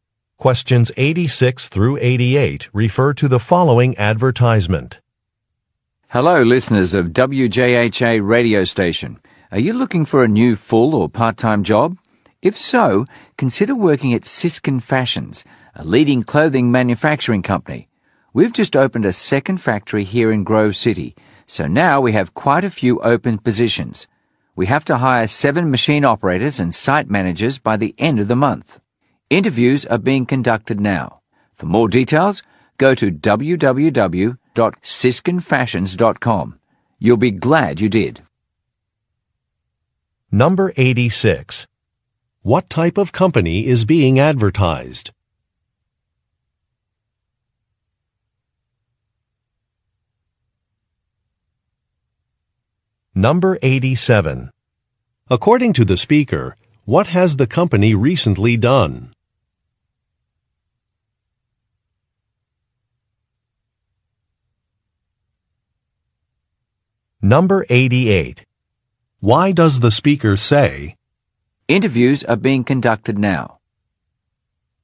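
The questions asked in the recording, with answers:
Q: What type of company is being advertised?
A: A clothing manufacturer

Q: According to the speaker, what has the company recently done?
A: Opened a second factory in Grove City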